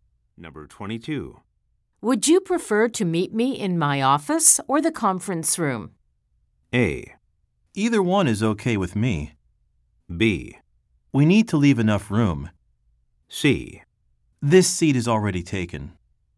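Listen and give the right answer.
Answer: A: Either one is okay with me.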